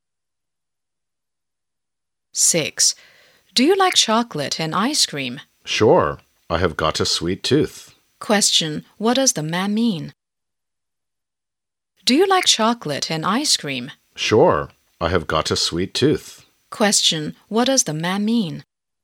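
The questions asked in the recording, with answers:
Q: Question, what does the man mean?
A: He likes sweet things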